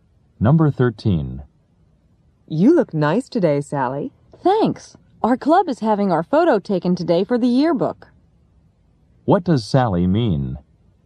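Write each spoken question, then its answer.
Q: What does Sally mean?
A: She dressed nicely because her club's yearbook photo is being taken today.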